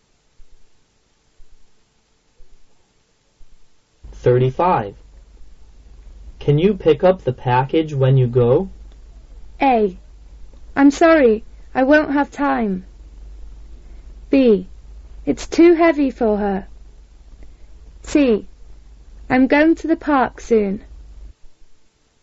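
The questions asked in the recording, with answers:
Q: Can you pick up the package when you go?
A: A: I'm sorry, I won't have time.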